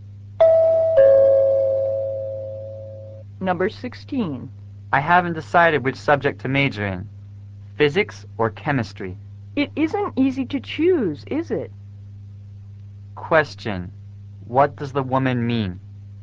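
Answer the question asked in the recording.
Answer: It is hard to choose between physics and chemistry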